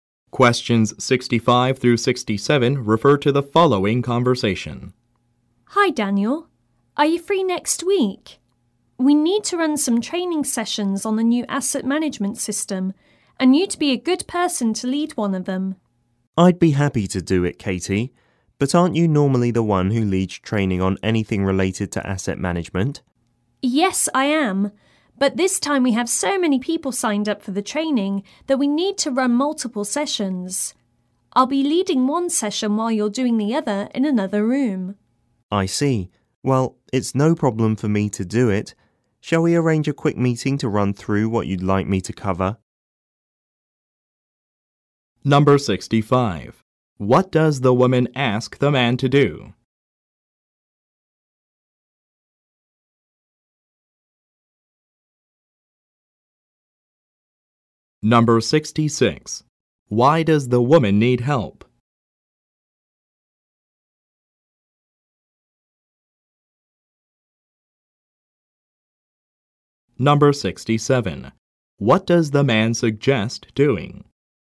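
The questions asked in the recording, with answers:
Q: What does the woman ask the man to do?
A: Lead a training session on the new asset management system

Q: Why does the woman need help?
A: So many people signed up that multiple sessions are needed

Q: What does the man suggest doing?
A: Arranging a quick meeting to go over what to cover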